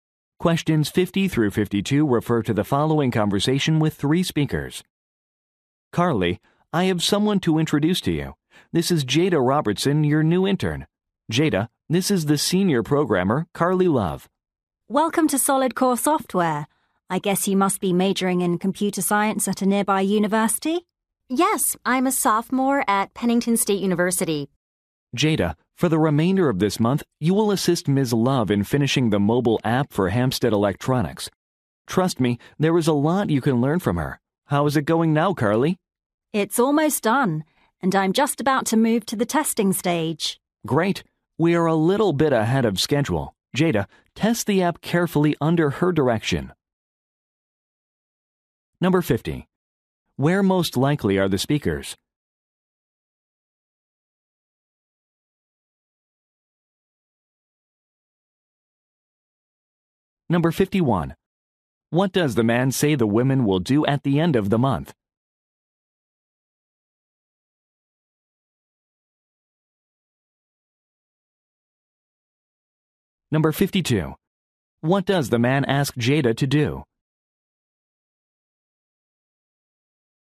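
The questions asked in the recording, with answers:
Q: Where most likely are the speakers?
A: At a software company

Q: What does the man ask Jada to do?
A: Test the app carefully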